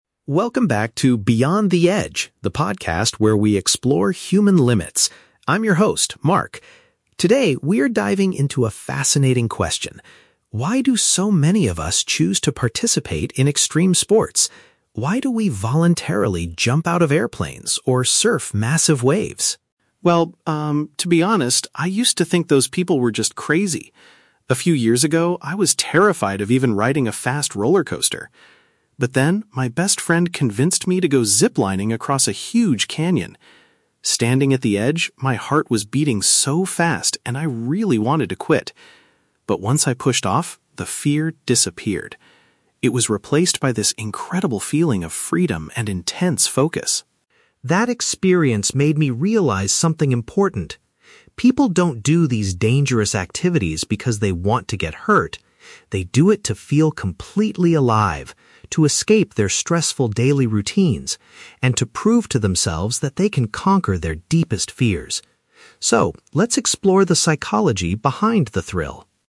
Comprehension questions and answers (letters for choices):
Listen to the introduction of a podcast about extreme sports. Choose the correct answer (A, B, or C) for each question.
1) What was the host's original opinion about people who do extreme sports?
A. He assumed they were highly trained professional athletes.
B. He believed that they were completely out of their minds.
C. He thought they were incredibly brave and focused individuals.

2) How did the host's feelings change during his zip-lining trip?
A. His initial terror turned into a sense of absolute liberty.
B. He felt sick because the roller coaster was moving too fast.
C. He wanted to stop because his chest was physically hurting.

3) According to the host, what is the real reason people take part in dangerous activities?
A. Because they secretly enjoy the risk of getting physically injured.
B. To show off their physical abilities to their close friends.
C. To get away from everyday pressure and overcome personal panic.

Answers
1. B
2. A
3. C

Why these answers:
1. The host says, "to be honest, I used to think those people were just crazy." Option B is a perfect paraphrase: "completely out of their minds" means crazy. Why the traps are wrong: Option A is plausible in real life, but not mentioned in the audio. Option C is a trap; the audio mentions "intense focus," but that was what he felt later, not his original opinion of other people.
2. The host says, "the fear disappeared. It was replaced by this incredible feeling of freedom." Option A paraphrases this: "initial terror" (fear) turned into a "sense of absolute liberty" (feeling of freedom). Why the traps are wrong: Option B is a trap using the words "roller coaster", but he didn't ride a roller coaster on the trip; he mentions it as a past fear. Option C is a trap; he says "my heart was beating so fast," but his chest wasn't physically hurting.
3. The host explains that people do it "to escape their stressful daily routines, and to prove to themselves that they can conquer their deepest fears." Option C perfectly matches this: "get away from everyday pressure" (escape routines) and "overcome personal panic" (conquer fears). Why the traps are wrong: Option A is a trap; the host explicitly says people do not do it "because they want to get hurt". Option B is a trap using the word "friend" from the audio, but the host doesn't say people do sports to show off to friends.

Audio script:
Host: Welcome back to "Beyond the Edge," the podcast where we explore human limits. I'm your host, Mark. Today, we are diving into a fascinating question: Why do so many of us choose to participate in extreme sports? Why do we voluntarily jump out of airplanes or surf massive waves?
to be honest, I used to think those people were just crazy. A few years ago, I was terrified of even riding a fast roller coaster. But then, my best friend convinced me to go zip-lining across a huge canyon. Standing at the edge, my heart was beating so fast, and I really wanted to quit. But once I pushed off, the fear disappeared. It was replaced by this incredible feeling of freedom and intense focus.
That experience made me realize something important. People don't do these dangerous activities because they want to get hurt. They do it to feel completely alive, to escape their stressful daily routines, and to prove to themselves that they can conquer their deepest fears. So, let's explore the psychology behind the thrill...